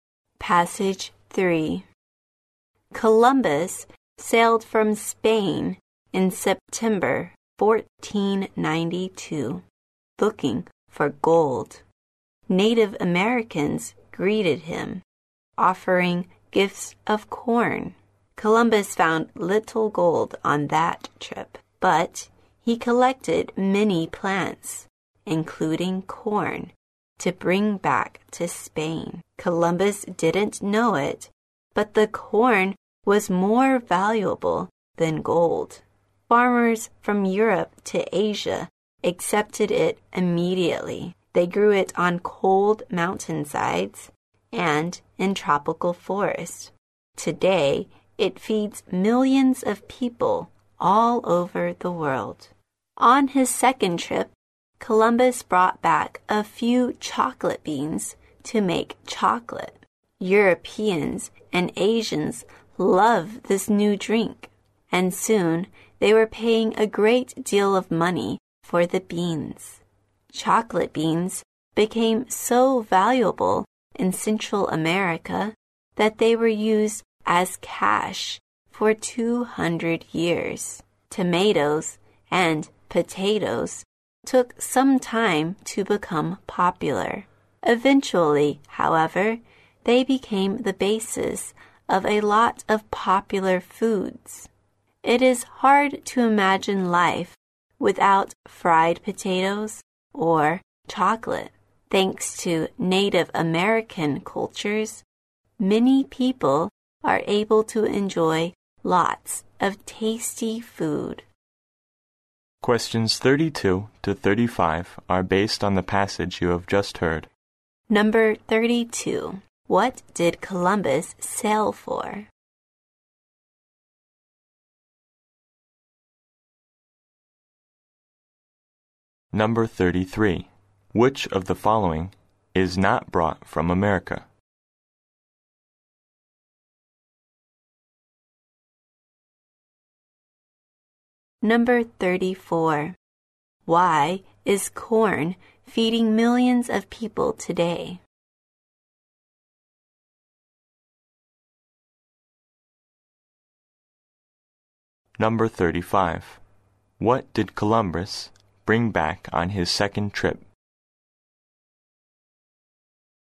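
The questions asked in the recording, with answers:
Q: What did Columbus sail for?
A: Gold

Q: What did Columbus bring back on his second trip?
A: Chocolate beans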